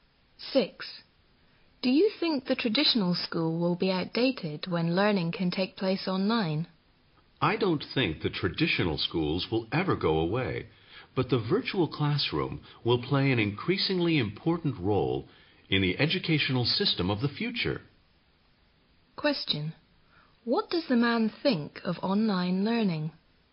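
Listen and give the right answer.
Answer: It will become increasingly important but won't replace traditional schools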